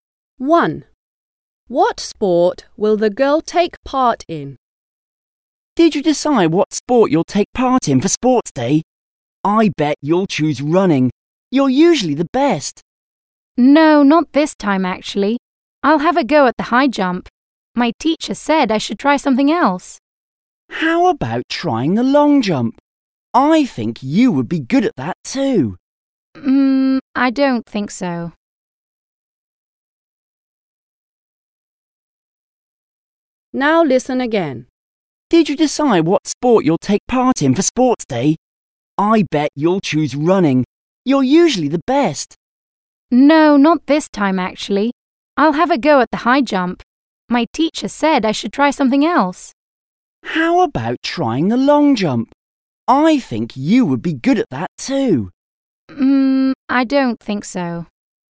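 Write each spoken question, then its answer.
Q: What sport will the girl take part in?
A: the high jump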